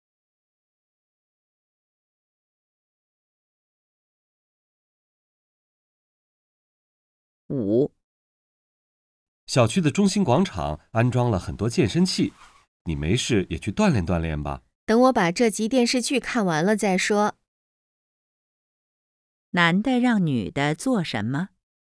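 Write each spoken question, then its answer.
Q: 男的让女的做什么?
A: 去小区广场用健身器锻炼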